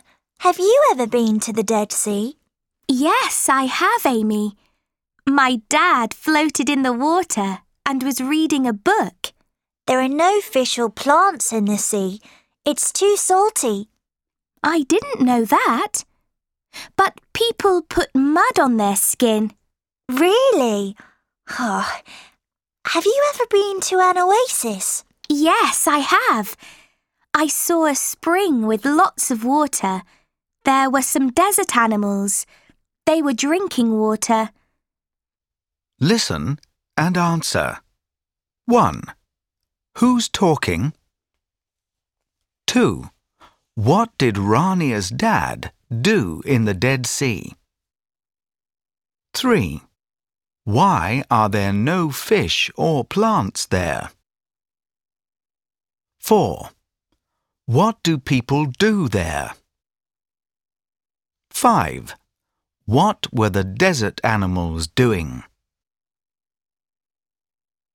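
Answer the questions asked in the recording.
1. Rania and Amy
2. He floated in the water and read a book.
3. It's too salty.
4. They put mud on their skin.
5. They were drinking water.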